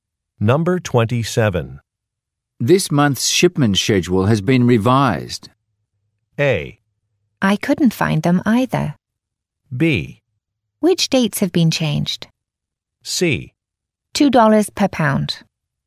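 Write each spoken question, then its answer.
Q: This month's shipment schedule has been revised.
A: B: Which dates have been changed?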